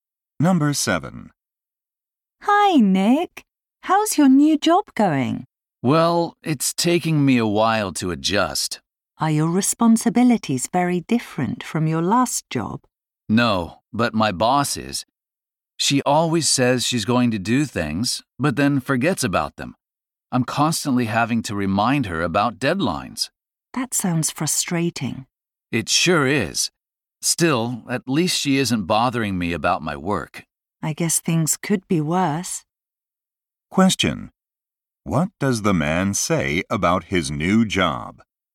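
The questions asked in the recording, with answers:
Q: What does the man say about his new job?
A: His boss keeps forgetting things, so he has to remind her about deadlines.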